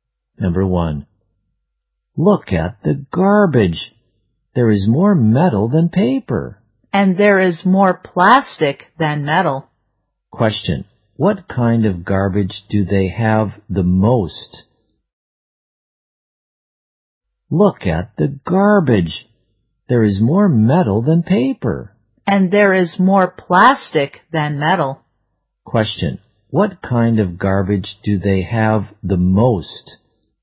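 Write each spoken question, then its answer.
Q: Question, what kind of garbage do they have the most?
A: Plastic.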